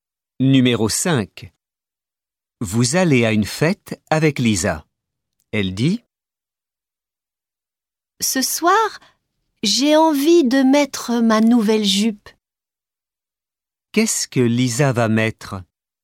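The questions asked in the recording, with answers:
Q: Qu'est-ce que Lisa va mettre?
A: Sa nouvelle jupe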